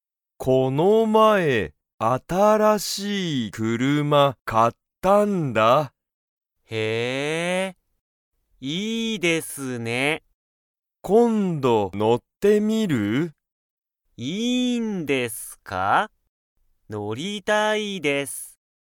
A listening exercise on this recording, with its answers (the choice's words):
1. マサは、____、新(あたら)しい車(くるま)を買(か)った。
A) 今度(こんど)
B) 今日(きょう)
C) この前(まえ)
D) すぐそこ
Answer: この前(まえ)

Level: Level 1